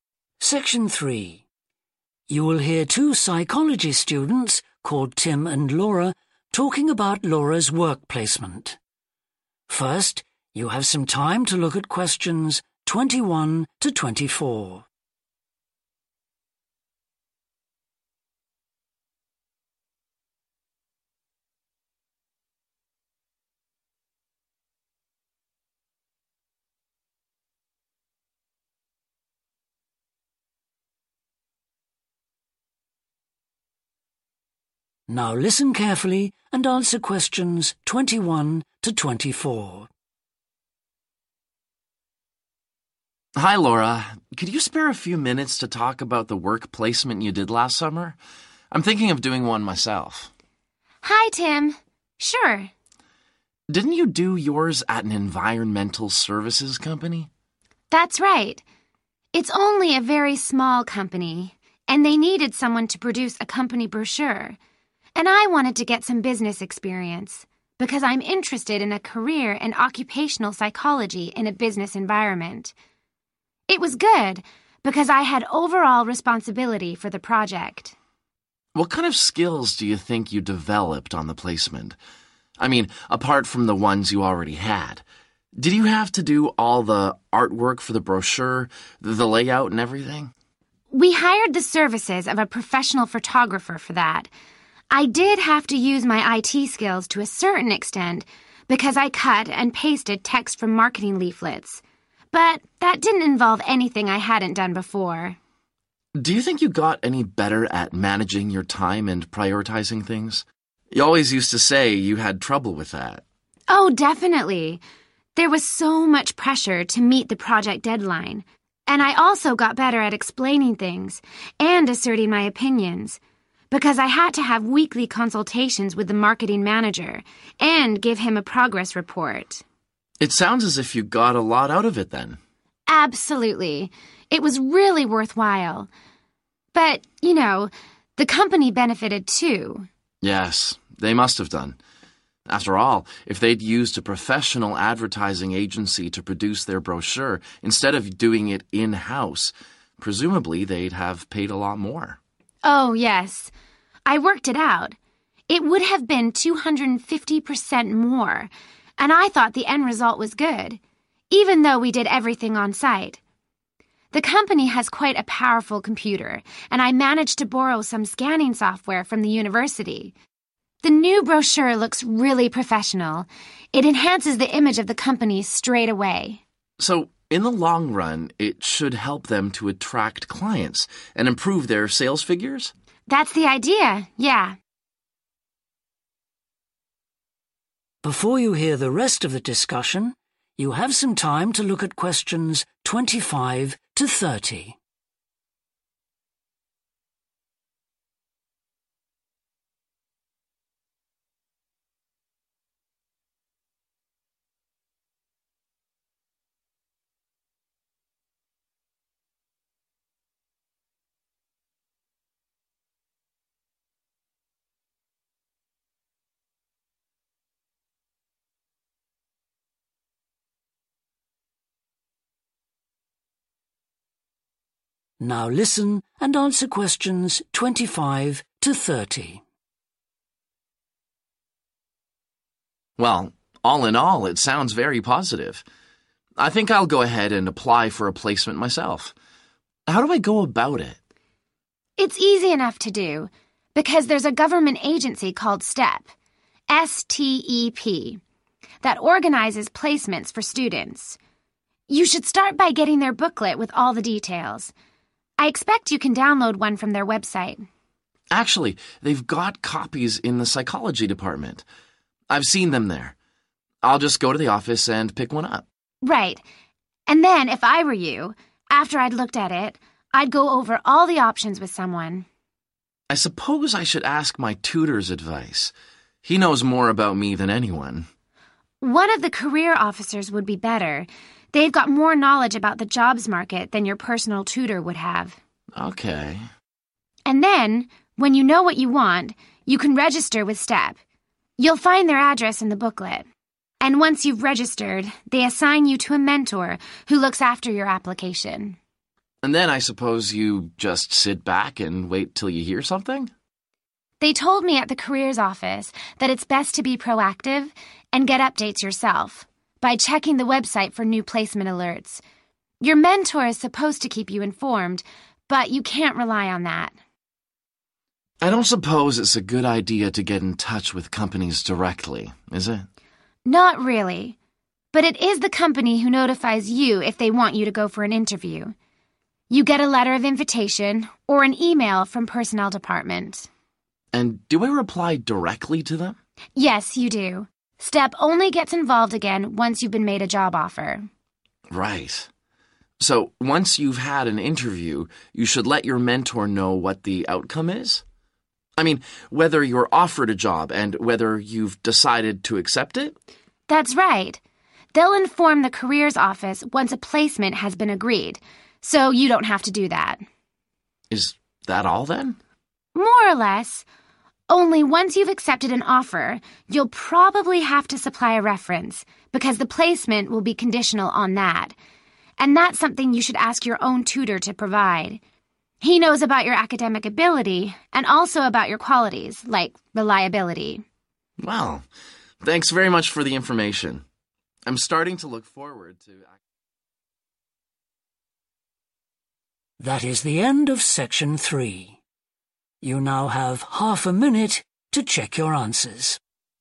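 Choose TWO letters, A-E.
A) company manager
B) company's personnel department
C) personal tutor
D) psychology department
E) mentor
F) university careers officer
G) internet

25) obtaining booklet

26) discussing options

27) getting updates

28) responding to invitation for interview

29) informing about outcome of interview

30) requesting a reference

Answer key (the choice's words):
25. psychology department
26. university careers officer
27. internet
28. company's personnel department
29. mentor
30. personal tutor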